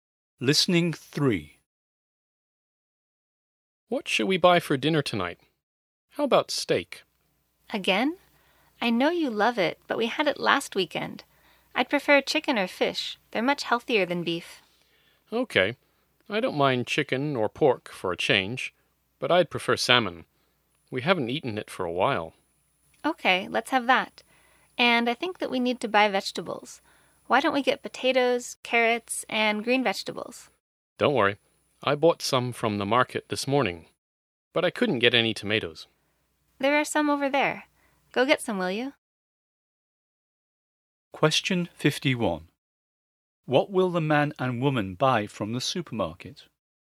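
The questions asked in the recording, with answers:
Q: What will the man and woman buy from the supermarket?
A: Salmon and tomatoes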